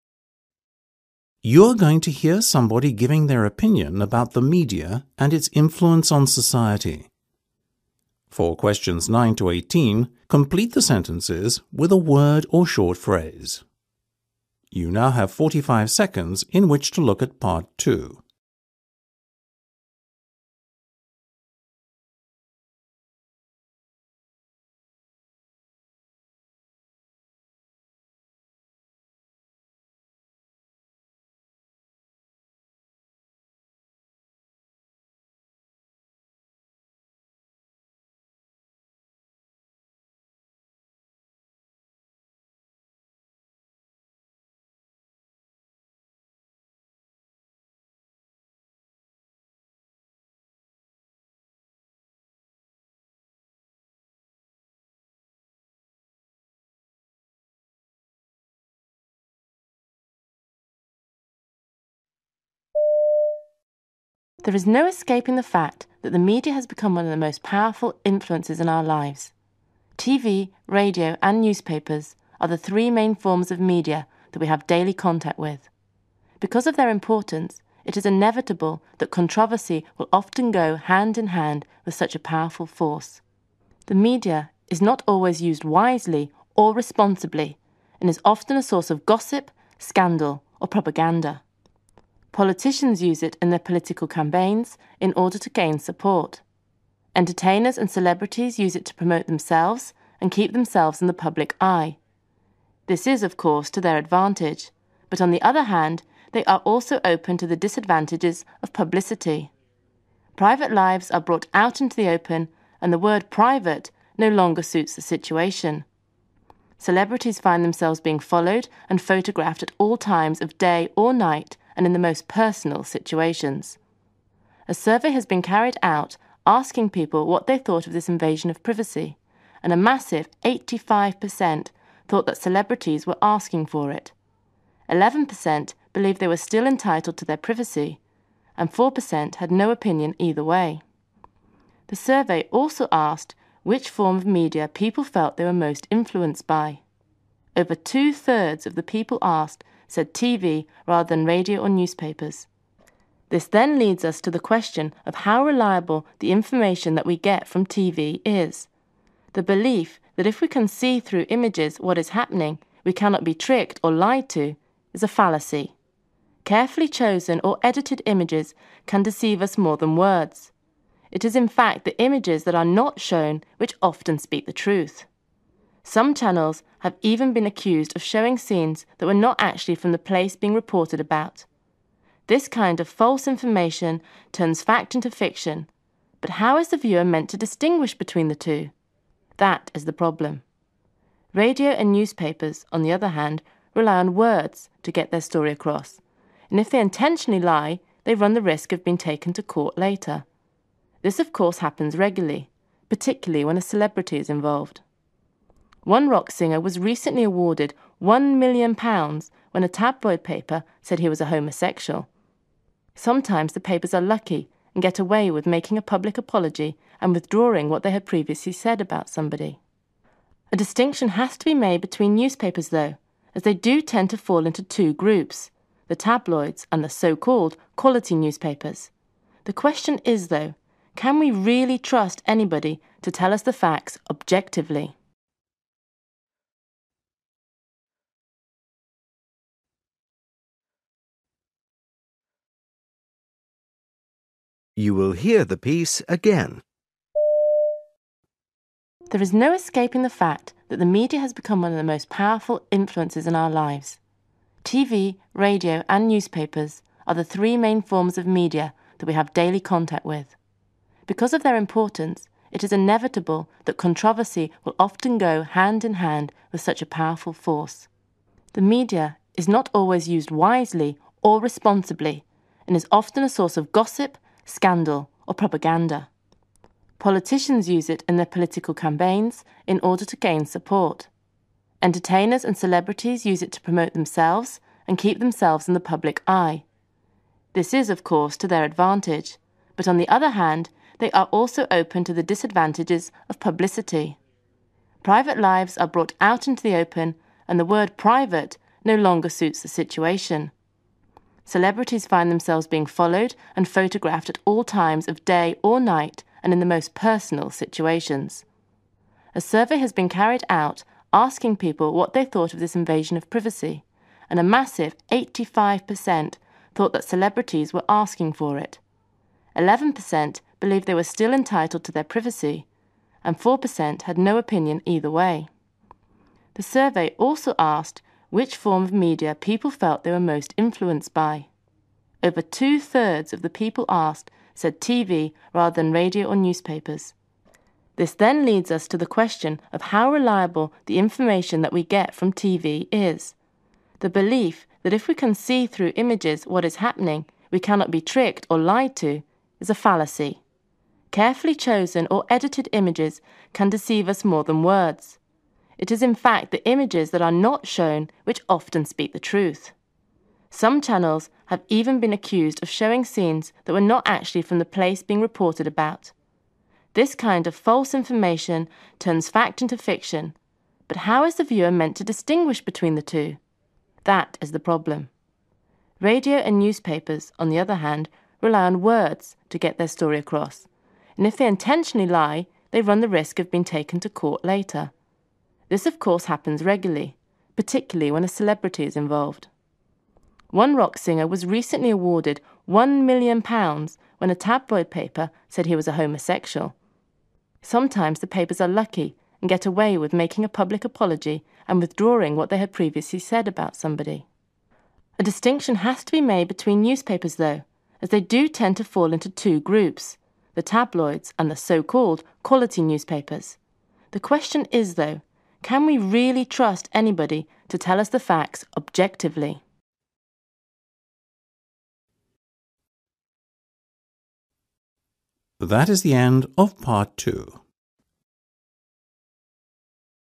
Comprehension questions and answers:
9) The three forms of media are TV, radio and (9) .............................. .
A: newspapers

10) Politicians use the media during political (10) .............................. .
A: campaigns

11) Entertainers use it to stay in the (11) .............................. .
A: public eye

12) The percentage of people who did not have a particular point of view about the privacy of celebrities was (12) .............................. .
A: 4%

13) The most influential form of media is (13) .............................. .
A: TV

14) We can be deceived by TV when we are shown carefully selected (14) .............................. .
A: images/pictures

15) Some TV stations turn true events into (15) .............................. .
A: fiction/lies

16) A newspaper had to pay (16) .............................. for printing lies about a pop singer.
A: £1,000,000

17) Sometimes a paper can avoid being sued if it makes a public (17) .............................. .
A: apology

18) There are two kinds of newspaper; the "quality" papers and the (18) .............................. .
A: tabloids

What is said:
There is no escaping the fact that the media has become one of the most powerful influences in our lives. TV, radio and newspapers are the three main forms of media that we have daily contact with. Because of their importance it is inevitable that controversy will often go hand in hand with such a powerful force.
The media is not always used wisely or responsibly and is often a source of gossip, scandal or propaganda. Politicians use it in their political campaigns in order to gain support. Entertainers and celebrities use it to promote themselves and keep themselves in the public eye. This is of course to their advantage but on the other hand they are also open to the disadvantages of publicity. Private lives are brought out into the open and the word private no longer suits the situation. Celebrities find themselves being followed and photographed at all times of day or night and in the most personal situations. A survey has been carried out asking people what they thought of this invasion of privacy and a massive 85% thought that celebrities were asking for it, 11% believed they were still entitled to their privacy and 4% had no opinion either way. The survey also asked which form of media people felt they were most influenced by. Over two thirds of the people asked said TV, rather than radio or newspapers.
This then leads us to the question of how reliable the information that we get from TV is. The belief that if we can see through images what is happening we cannot be tricked or lied to, is a fallacy. Care fully chosen or edited images can deceive us more than words. It is in fact the images that are not shown which often speak the truth. Some channels have even been accused of showing scenes that were not actually from the place being reported about. This kind of false information turns fact into fiction but how is the viewer meant to distinguish between the two? That is the problem. Radio and newspapers, on the other hand rely on words to get their story across and if they intentionally lie they run the risk of being taken to court later. This of course happens regularly, particularly when a celebrity is involved. One rock singer was recently awarded one million pounds when a tabloid paper said he was a homosexual. Sometimes the papers are lucky and get away with making a public apology and withdrawing what they have previously said about somebody. A distinction has to be made between newspapers though as they do tend to fall into two groups; the tabloids and the so called "quality newspapers". The question is though, can we really trust anybody to tell us the facts objectively?

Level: Practice FCE (B2) Listening Test 08